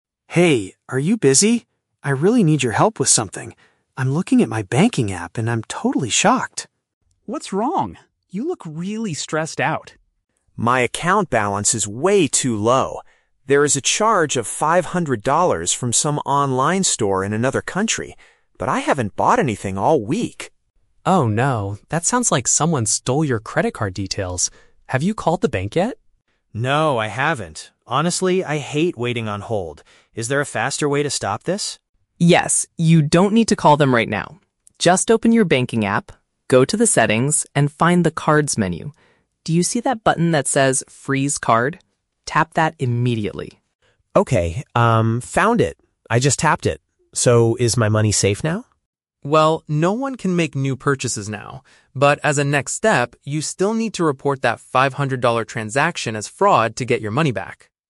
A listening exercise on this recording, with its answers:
Listen to the conversation between two roommates and choose the correct answer (A, B, or C) for each question.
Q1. What is the main problem Alex is facing?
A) Someone used his card to make a large international purchase.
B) He lost his physical credit card while traveling in another country.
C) His banking application is broken and he cannot check his balance.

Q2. Why doesn't Alex want to call the bank immediately?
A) Because the bank office is already closed for the weekend.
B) Because he dislikes staying on the phone waiting for someone to answer.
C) Because Ben offered to call the bank manager for him.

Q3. How does Ben suggest solving the immediate danger?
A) By transferring the remaining money to Ben's account.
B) By reporting the missing money to the police department.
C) By temporarily blocking the card through the mobile application.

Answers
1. A) Someone used his card to make a large international purchase.
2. B) Because he dislikes staying on the phone waiting for someone to answer.
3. C) By temporarily blocking the card through the mobile application.

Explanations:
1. Alex mentions there is a "charge of 500 dollars from some online store in another country." This means someone used his card for an international purchase. Why the traps are wrong: Option B is a trap; the audio mentions "another country," but Alex didn't lose his physical card while traveling. Option C is plausible, but his app works perfectly fine (he can see the balance).
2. Alex says, "Honestly, I hate waiting on hold." "Waiting on hold" means waiting on the phone line for someone to answer, which matches option B. Why the traps are wrong: Option A is plausible but never mentioned in the audio. Option C is a trap; Ben is helping him, but Ben does not offer to make the phone call for him.
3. Ben tells Alex to find the "Freeze Card" button on his banking app and "tap that immediately." Freezing a card means temporarily blocking it. Why the traps are wrong: Option A is not mentioned at all. Option B is a trap; Ben tells Alex to "report... as fraud" to the bank later, not to the police as the immediate solution.

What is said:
Alex: Hey, are you busy? I really need your help with something. I'm looking at my banking app, and I'm totally shocked.
Ben: What's wrong? You look really stressed out.
Alex: My account balance is way too low. There is a charge of 500 dollars from some online store in another country, but I haven't bought anything all week!
Ben: Oh no, that sounds like someone stole your credit card details. Have you called the bank yet?
Alex: No, I haven't. Honestly, I hate waiting on hold. Is there a faster way to stop this?
Ben: Yes, you don't need to call them right now. Just open your banking app. Go to the settings and find the "Cards" menu. Do you see that button that says "Freeze Card"? Tap that immediately.
Alex: Okay, um... found it! I just tapped it. So, is my money safe now?
Ben: Well, no one can make new purchases now. But as a next step, you still need to report that 500-dollar transaction as fraud to get your money back.

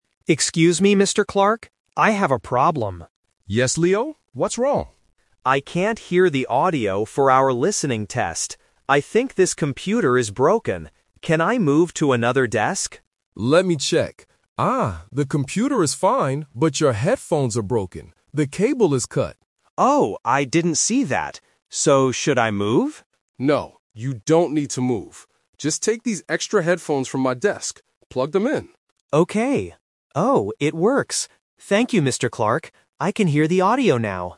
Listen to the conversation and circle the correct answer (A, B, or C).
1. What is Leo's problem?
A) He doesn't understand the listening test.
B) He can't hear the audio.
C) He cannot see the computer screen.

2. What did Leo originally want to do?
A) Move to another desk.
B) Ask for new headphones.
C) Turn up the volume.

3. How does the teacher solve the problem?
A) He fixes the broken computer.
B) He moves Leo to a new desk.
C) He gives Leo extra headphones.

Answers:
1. B) He can't hear the audio.
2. A) Move to another desk.
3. C) He gives Leo extra headphones.

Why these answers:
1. Leo states his problem clearly at the beginning: "I can't hear the audio for our listening test." Why the trap is wrong: Option (A) is a plausible guess for a student taking a test, but it is not his problem. Option (C) was not mentioned.
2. Because he thinks the computer is broken, Leo asks, "Can I move to another desk?" Why the trap is wrong: Option (B) is the trap. Getting new headphones is the solution the teacher gives him, not what Leo originally asked for. Option (C) was not mentioned.
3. Mr. Clark tells him, "Just take these extra headphones from my desk." Why the trap is wrong: Option (A) is a trap because Leo thought the computer was broken, but Mr. Clark says "the computer is fine." Option (B) is the main trap (The Twist). Leo asked to move, but Mr. Clark explicitly says, "No, you don't need to move."

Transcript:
Leo: Excuse me, Mr. Clark. I have a problem.
Mr. Clark: Yes, Leo? What's wrong?
Leo: I can't hear the audio for our listening test. I think this computer is broken. Can I move to another desk?
Mr. Clark: Let me check. Ah, the computer is fine, but your headphones are broken. The cable is cut.
Leo: Oh, I didn't see that. So, should I move?
Mr. Clark: No, you don't need to move. Just take these extra headphones from my desk. Plug them in.
Leo: Okay... Oh, it works! Thank you, Mr. Clark. I can hear the audio now.

